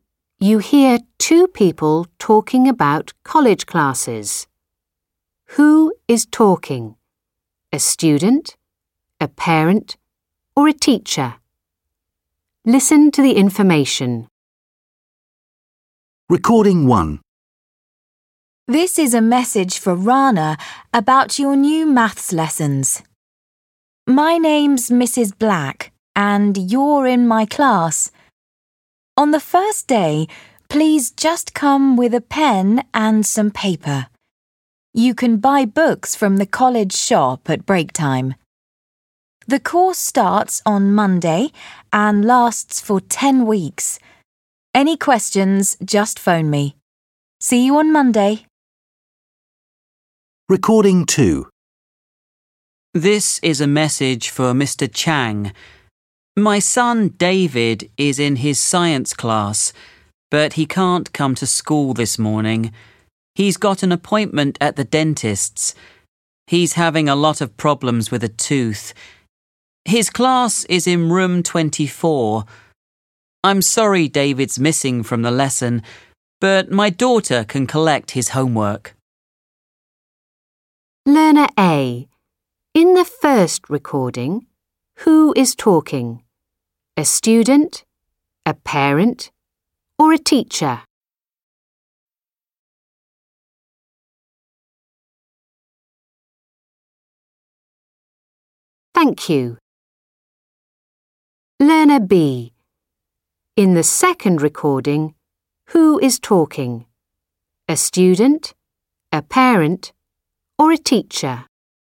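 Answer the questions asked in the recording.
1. a teacher
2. a parent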